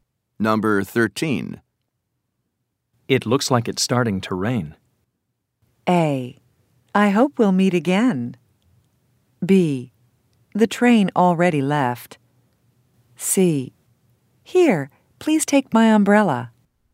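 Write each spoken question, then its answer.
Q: It looks like it's starting to rain.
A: C: Here, please take my umbrella.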